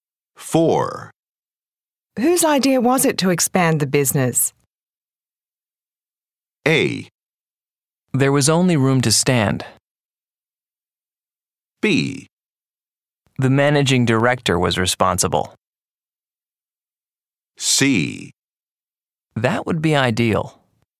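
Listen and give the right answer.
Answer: B: The managing director was responsible.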